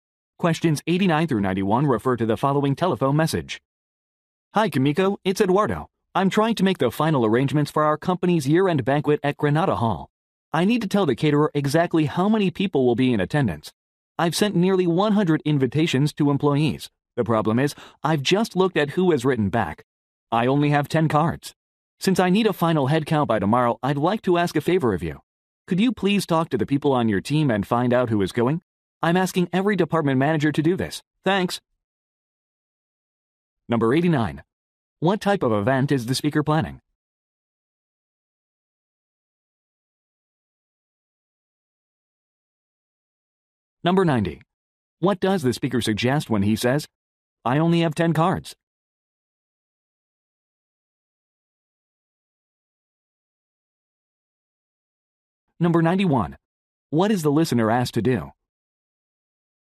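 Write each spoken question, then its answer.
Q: What type of event is the speaker planning?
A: A company year-end banquet

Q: What does the speaker suggest when he says, "I only have 10 cards"?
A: Few people have responded to the invitation

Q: What is the listener asked to do?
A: Find out which team members are attending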